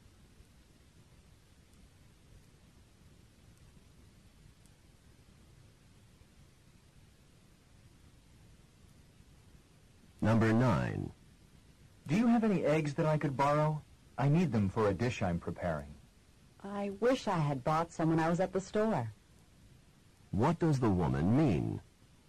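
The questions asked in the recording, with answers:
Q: What does the woman mean?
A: She has no eggs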